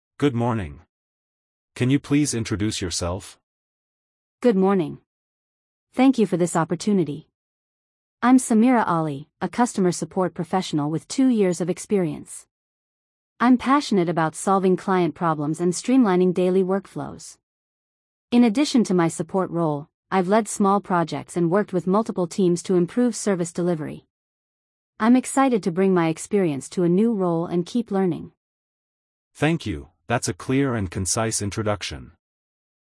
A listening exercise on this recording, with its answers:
Complete the phrases as you listen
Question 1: I'm Samira Ali, a customer support professional ______ two years of experience.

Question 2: I'm passionate about ______ client problems and streamlining daily workflows.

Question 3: I've led small projects and worked ______ multiple teams to improve service delivery.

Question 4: I'm excited to ______ my experience to a new role and keep learning.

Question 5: I'm passionate about solving client ______ and streamlining daily workflows.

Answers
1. with
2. solving
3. with
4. bring
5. problems

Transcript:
Good morning! Can you please introduce yourself?
Good morning! Thank you for this opportunity. I'm Samira Ali, a customer support professional with two years of experience. I'm passionate about solving client problems and streamlining daily workflows. In addition to my support role, I've led small projects and worked with multiple teams to improve service delivery.
"I've led small projects and worked with multiple teams to improve service delivery."
Perfect! "I'm excited to bring my experience to a new role and keep learning."